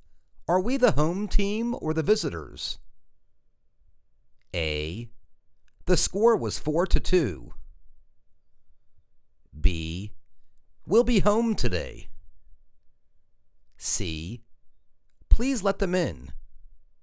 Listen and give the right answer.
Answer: We'll be home today.